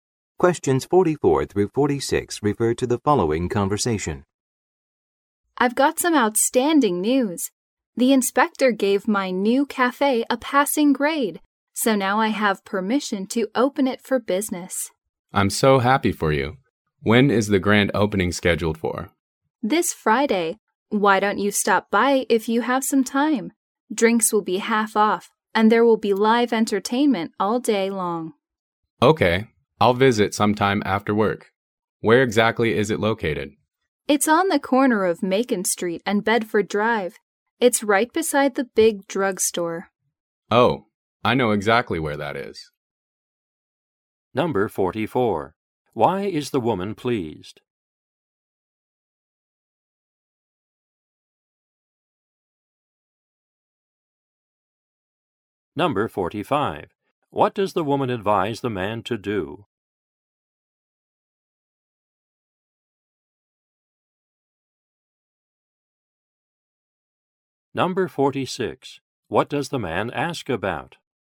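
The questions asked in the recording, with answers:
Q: Why is the woman pleased?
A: Her new cafe passed inspection

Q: What does the woman advise the man to do?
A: Come to the grand opening on Friday

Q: What does the man ask about?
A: The cafe's location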